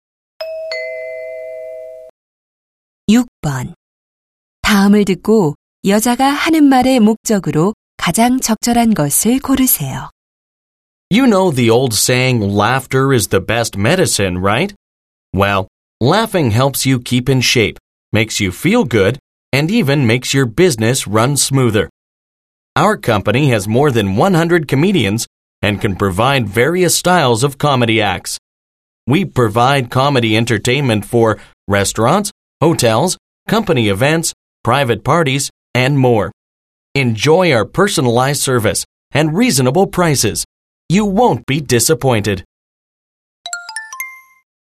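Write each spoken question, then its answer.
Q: 다음을 듣고 여자가 하는 말의 목적으로 가장 적절한 것을 고르세요.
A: 코미디 공연 서비스 광고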